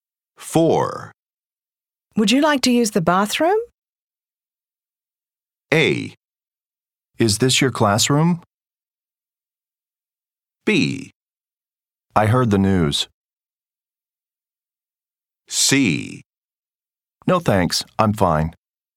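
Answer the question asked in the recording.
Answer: C: No thanks, I'm fine.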